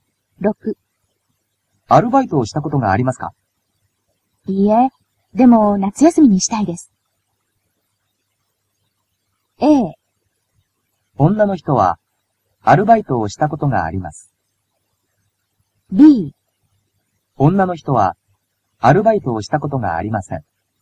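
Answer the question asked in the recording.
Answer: B: 女の人はアルバイトをしたことがありません。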